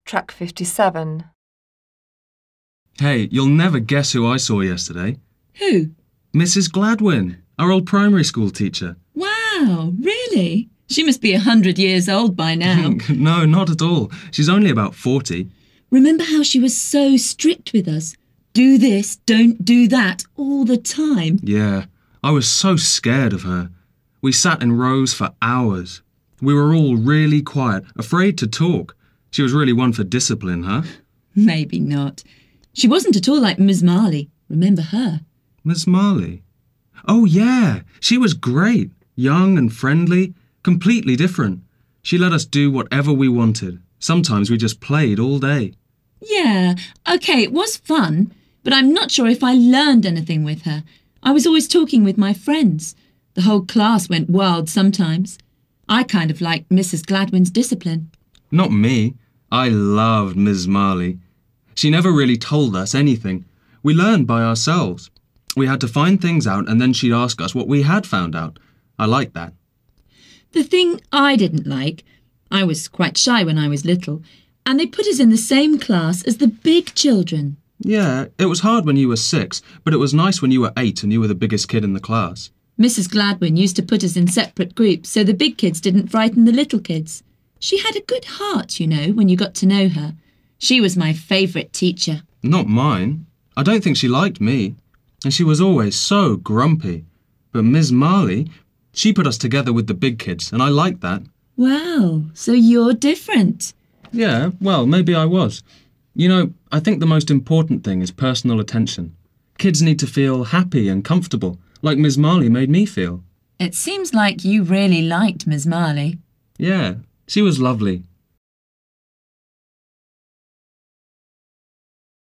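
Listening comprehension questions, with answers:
You have 30 seconds to read the task. Then listen to brian and Molly talking about two of their primary school teachers and tick off the correcht answers.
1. Mrs Gladwin is 100 years old now.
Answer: false

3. It was always very quiet in Ms Marley's classes.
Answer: false

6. Ms Marley allowed pupils to find out this for themselves.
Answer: true

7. Brian likes Ms Marley because she made him feel comfortable.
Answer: true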